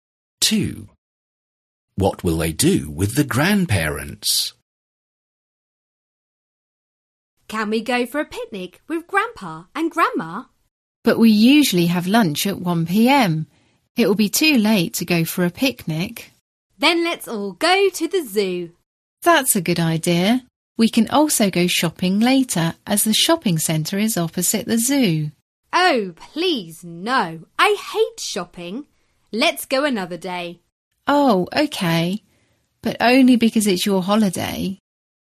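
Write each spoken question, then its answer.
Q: What will they do with the grandparents?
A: Go to the zoo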